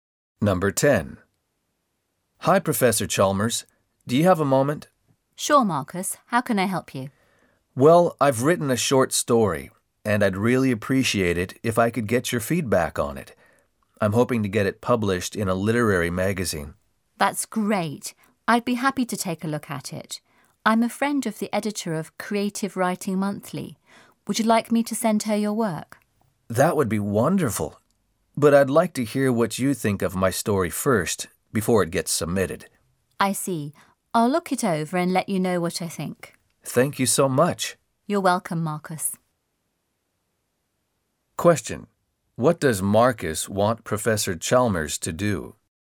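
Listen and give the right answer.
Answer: Give feedback on his short story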